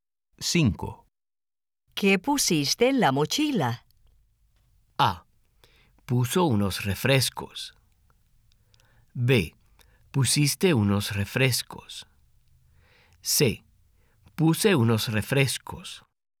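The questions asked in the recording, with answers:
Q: ¿Qué pusiste en la mochila?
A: C: Puse unos refrescos.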